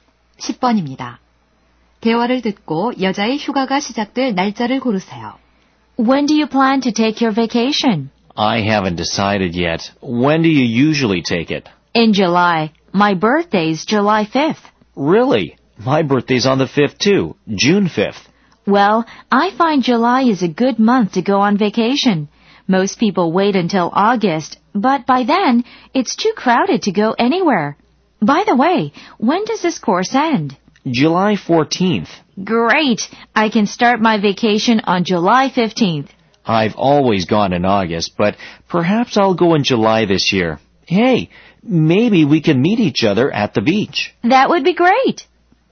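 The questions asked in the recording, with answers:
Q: 대화를 듣고 여자의 휴가가 시작될 날짜를 고르세요.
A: 7월 15일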